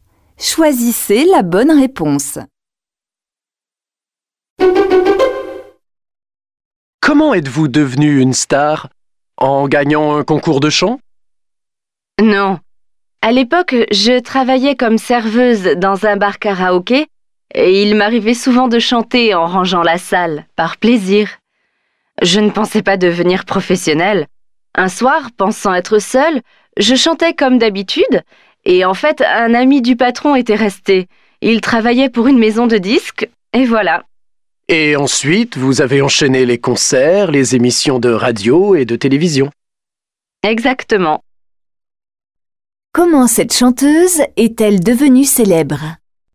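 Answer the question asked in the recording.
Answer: Un ami du patron, qui travaillait pour une maison de disques, l'a entendue chanter seule dans le bar karaoké où elle était serveuse.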